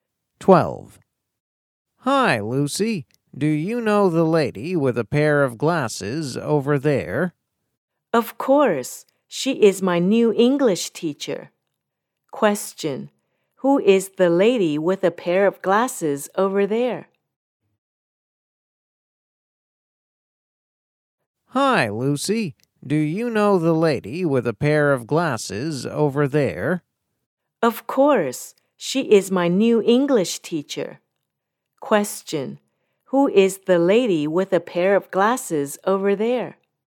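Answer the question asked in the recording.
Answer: Lucy's new English teacher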